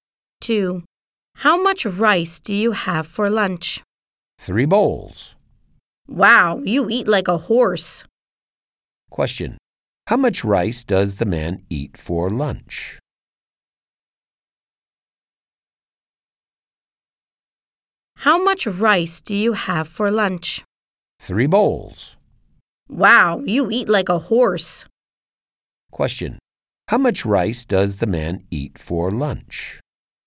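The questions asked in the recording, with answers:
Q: How much rice does the man eat for lunch?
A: Three bowls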